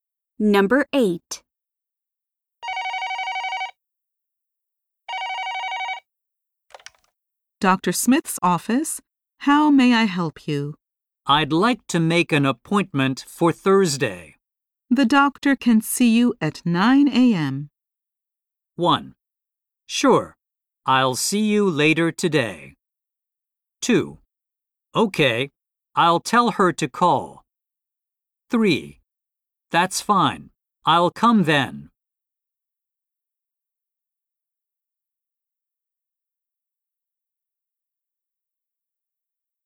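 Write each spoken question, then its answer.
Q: The doctor can see you at 9 a.m.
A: 3: That's fine, I'll come then.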